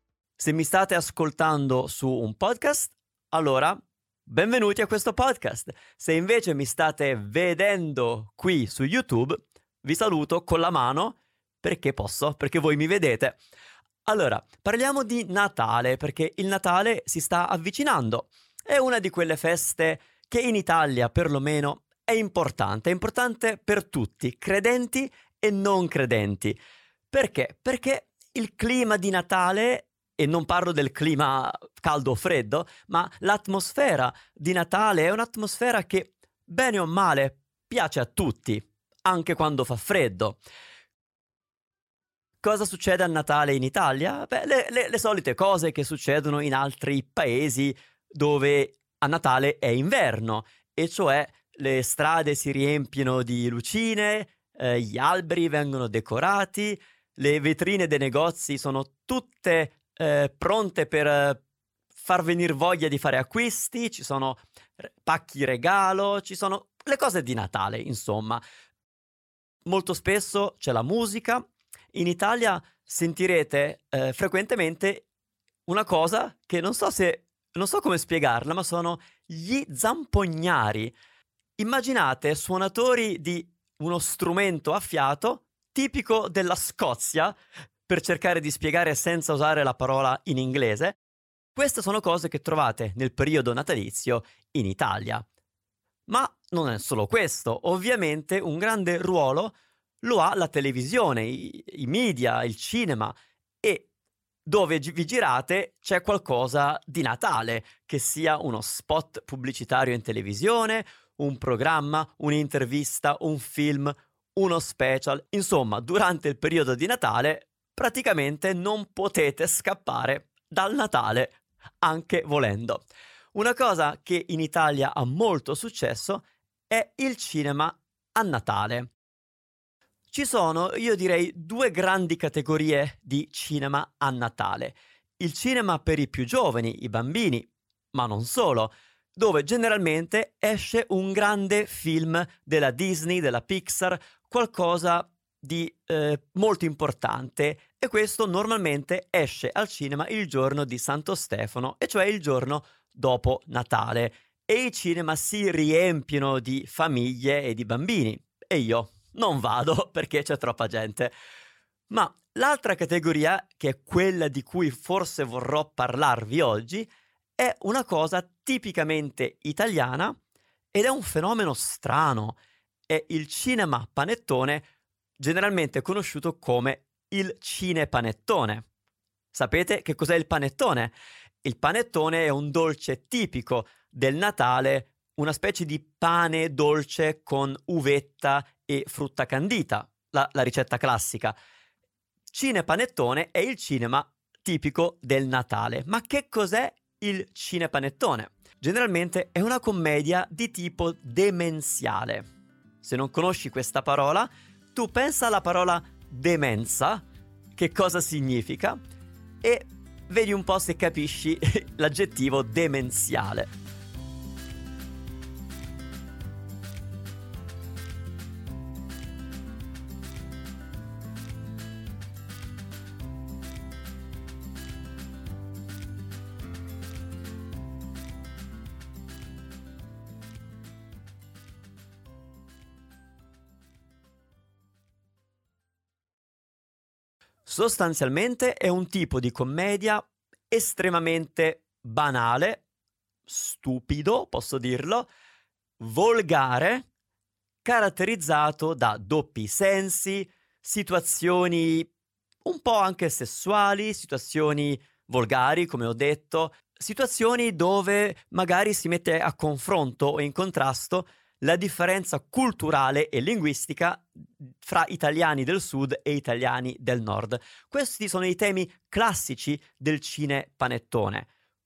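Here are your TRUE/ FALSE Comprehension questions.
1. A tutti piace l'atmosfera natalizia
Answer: True

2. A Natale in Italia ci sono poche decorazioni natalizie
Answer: False

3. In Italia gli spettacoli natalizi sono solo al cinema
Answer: False

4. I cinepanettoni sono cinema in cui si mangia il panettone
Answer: False

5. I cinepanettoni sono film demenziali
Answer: True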